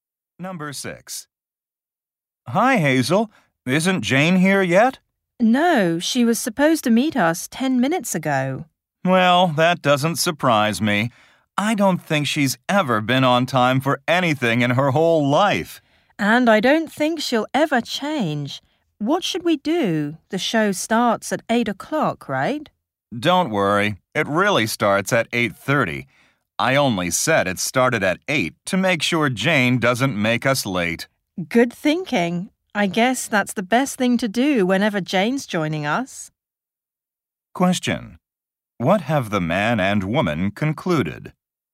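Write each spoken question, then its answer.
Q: What have the man and woman concluded?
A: They should tell Jane an earlier start time so she isn't late.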